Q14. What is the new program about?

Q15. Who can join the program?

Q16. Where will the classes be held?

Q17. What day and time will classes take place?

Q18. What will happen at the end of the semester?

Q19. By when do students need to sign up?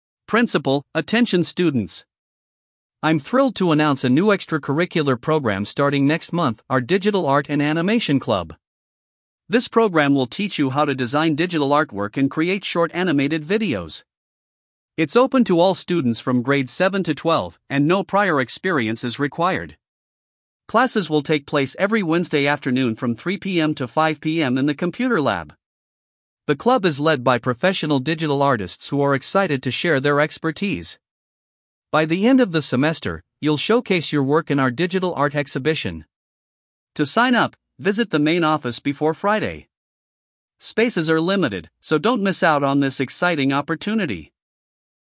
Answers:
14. Digital art and animation
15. Grades 7 to 12
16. Computer lab
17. Wednesday, 3 PM to 5 PM
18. Digital art exhibition
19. Friday

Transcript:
Principal: Attention students! I'm thrilled to announce a new extracurricular program starting next month—our Digital Art and Animation Club. This program will teach you how to design digital artwork and create short animated videos. It's open to all students from grades 7 to 12, and no prior experience is required.
Classes will take place every Wednesday afternoon from 3 PM to 5 PM in the computer lab. The club is led by professional digital artists who are excited to share their expertise. By the end of the semester, you'll showcase your work in our digital art exhibition.
To sign up, visit the main office before Friday. Spaces are limited, so don't miss out on this exciting opportunity!